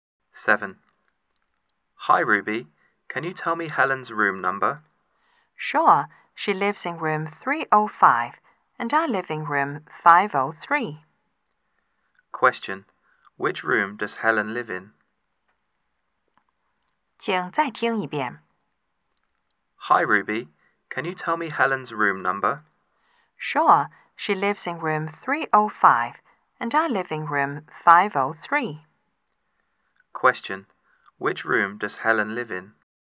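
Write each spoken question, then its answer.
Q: Question, which room does Helen live in?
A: Room 305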